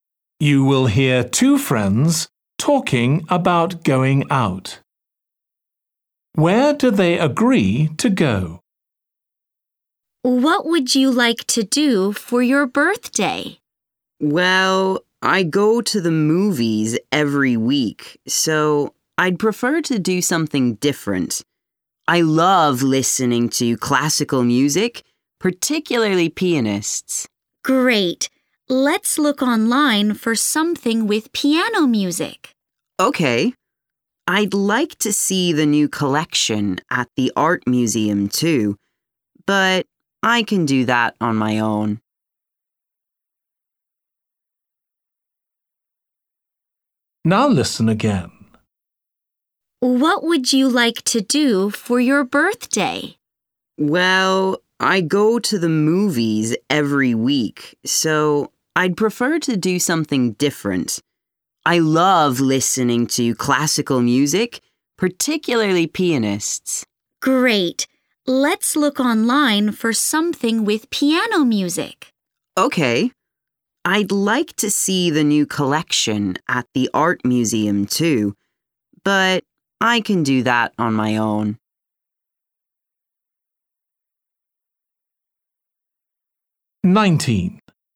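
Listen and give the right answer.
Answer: To a concert with piano music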